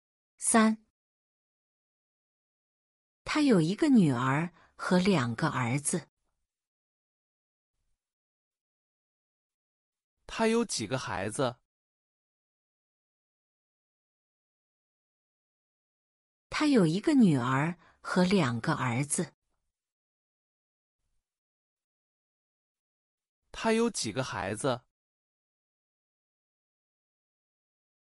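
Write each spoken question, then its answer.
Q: 他有几个孩子?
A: 三个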